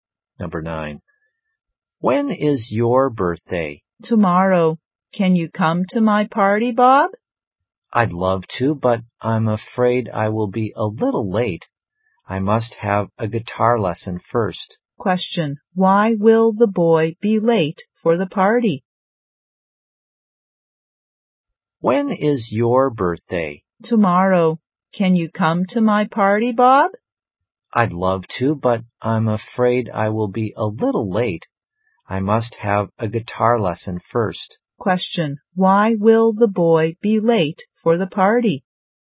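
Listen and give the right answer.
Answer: He must have a guitar lesson first.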